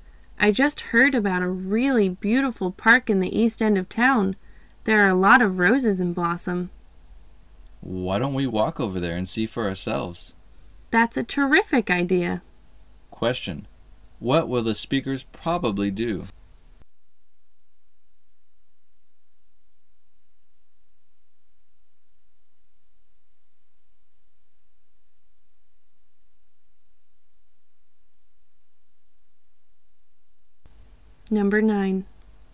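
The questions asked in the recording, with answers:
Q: What will the speakers probably do?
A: Walk to the park to see the roses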